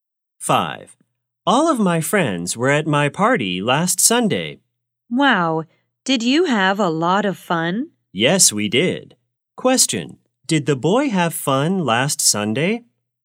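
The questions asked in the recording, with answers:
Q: Question, did the boy have fun last Sunday?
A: Yes, he did.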